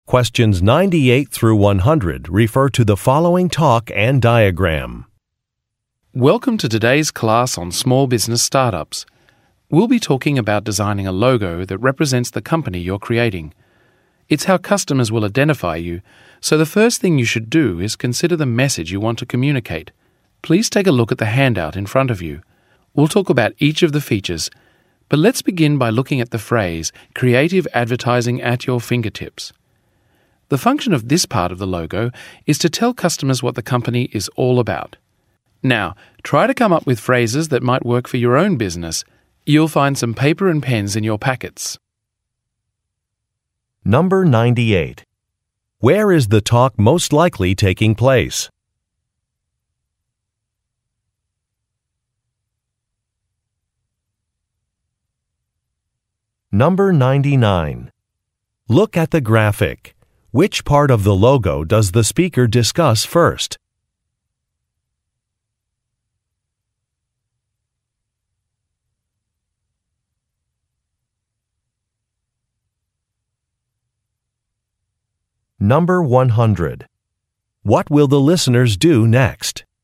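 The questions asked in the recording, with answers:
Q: Where is the talk most likely taking place?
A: In a class on small business startups

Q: What will the listeners do next?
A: Write phrases that might work for their own business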